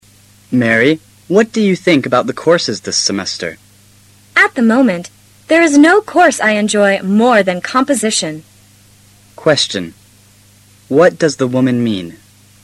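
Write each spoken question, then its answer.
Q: What does the woman mean?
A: She likes composition best of all her courses.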